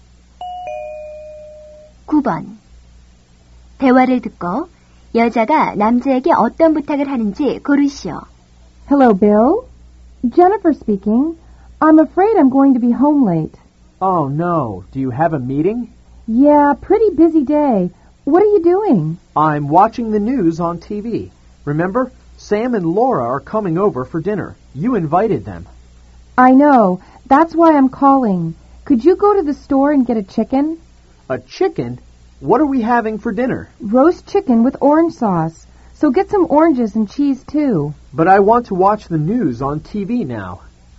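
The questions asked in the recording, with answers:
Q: 대화를 듣고 여자가 남자에게 어떤 부탁을 하는지 고르시오.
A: 가게에 가서 닭고기(와 오렌지, 치즈)를 사 오기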